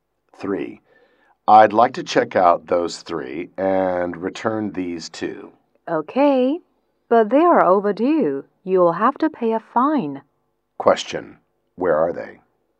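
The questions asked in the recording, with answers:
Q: Where are they?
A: In a library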